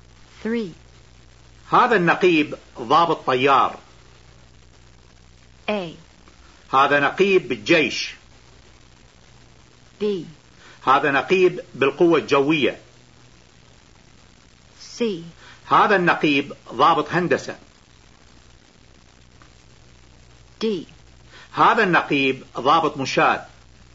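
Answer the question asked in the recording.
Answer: B: هذا نقيب بالقوة الجوية.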